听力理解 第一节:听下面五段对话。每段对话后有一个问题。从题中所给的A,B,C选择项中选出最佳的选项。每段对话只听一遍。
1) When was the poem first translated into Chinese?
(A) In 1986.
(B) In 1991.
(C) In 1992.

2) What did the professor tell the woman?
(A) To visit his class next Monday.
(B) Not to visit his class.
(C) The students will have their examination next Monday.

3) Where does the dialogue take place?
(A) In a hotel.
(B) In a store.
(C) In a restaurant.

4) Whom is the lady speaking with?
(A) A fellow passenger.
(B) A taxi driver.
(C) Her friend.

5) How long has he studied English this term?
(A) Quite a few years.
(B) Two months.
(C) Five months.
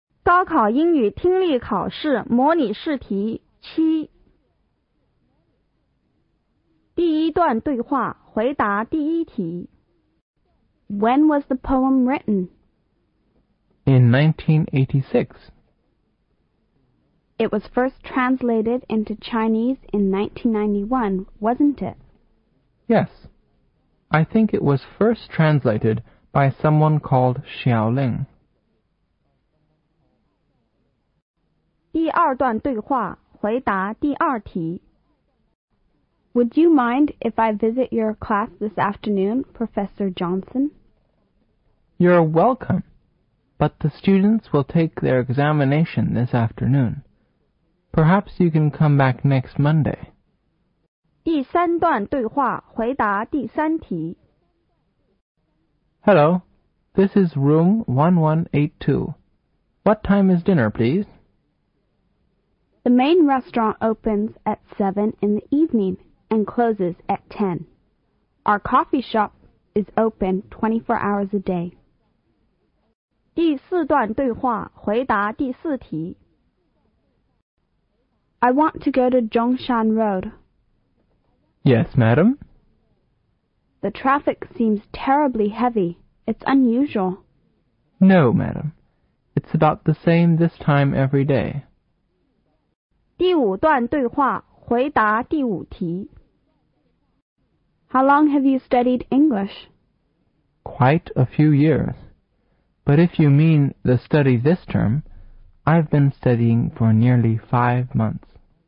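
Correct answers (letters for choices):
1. B
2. A
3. A
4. B
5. C

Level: 高考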